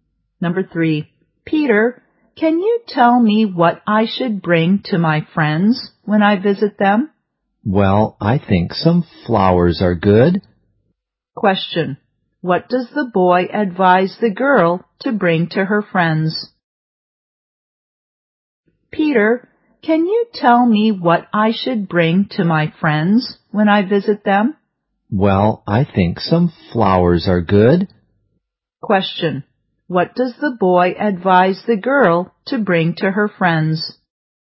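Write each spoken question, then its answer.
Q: Question,What does the boy advise the girl to bring to her friends?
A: Some flowers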